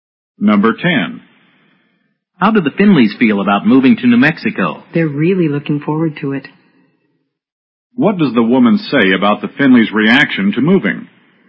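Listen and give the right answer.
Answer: They're eager and looking forward to it.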